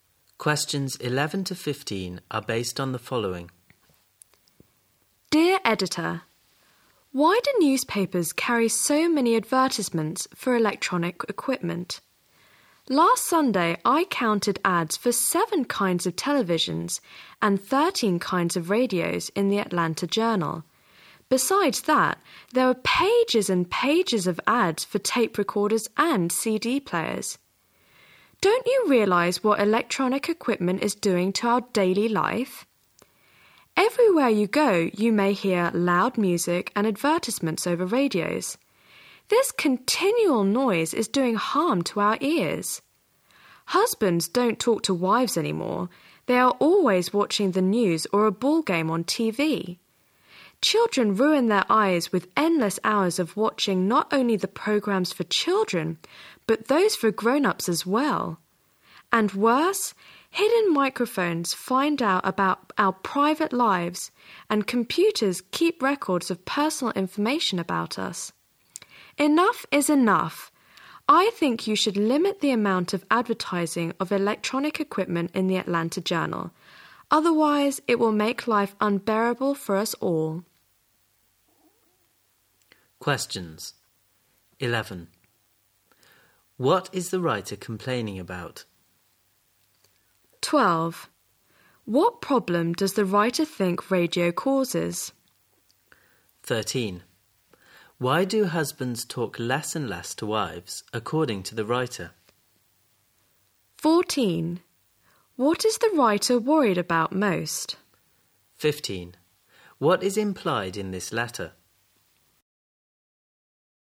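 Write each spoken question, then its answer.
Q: What is the writer complaining about?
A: Newspapers carry too many ads for electronic equipment

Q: What problem does the writer think radio causes?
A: Its constant noise harms our ears

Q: Why do husbands talk less and less to wives, according to the writer?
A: They are always watching TV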